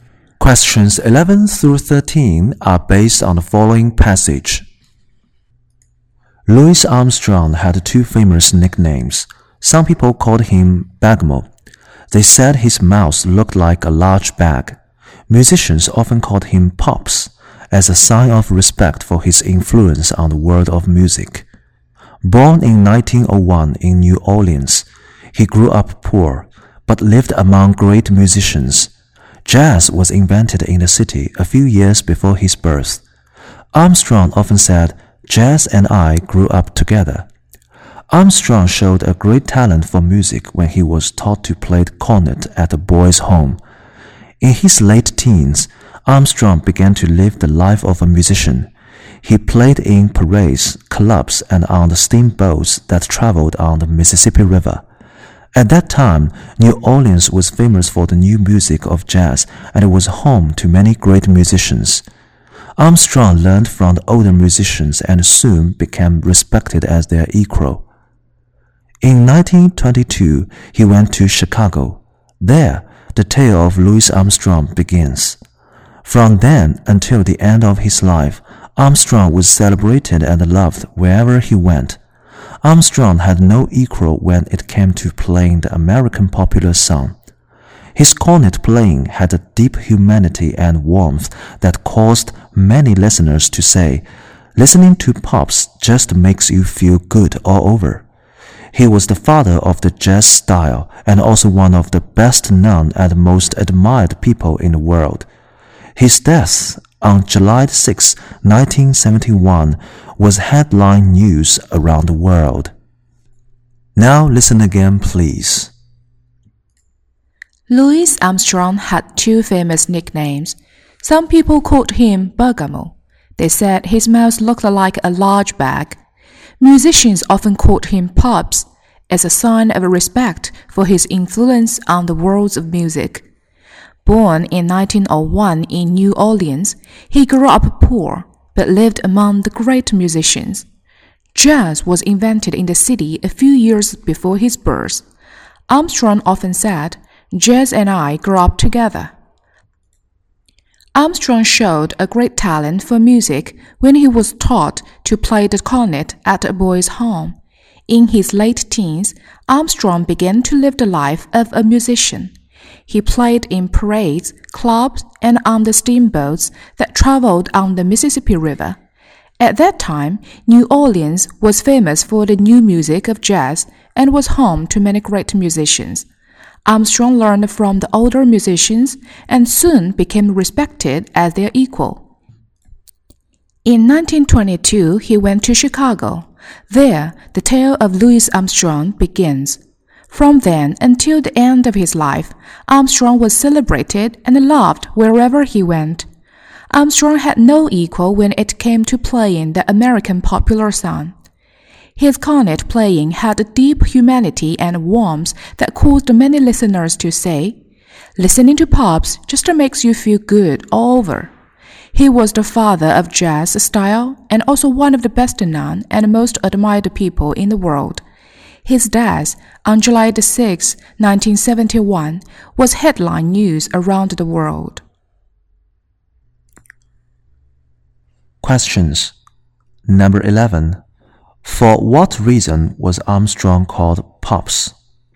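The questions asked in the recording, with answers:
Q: For what reason was Armstrong called Pops?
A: As a sign of respect for his influence on music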